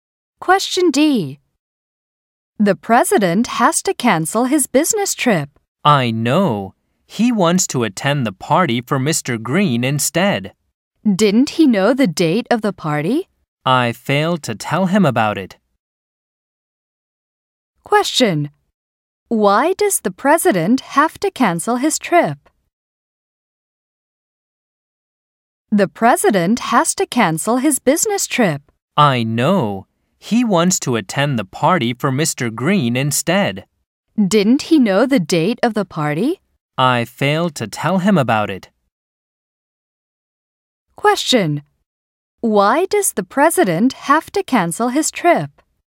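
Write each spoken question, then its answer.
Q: Why does the president have to cancel his trip?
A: He wants to attend the party for Mr. Green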